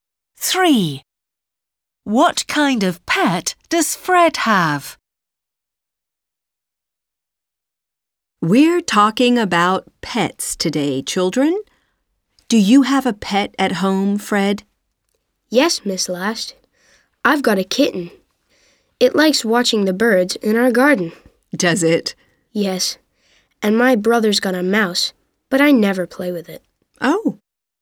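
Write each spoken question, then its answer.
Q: What kind of pet does Fred have?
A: A kitten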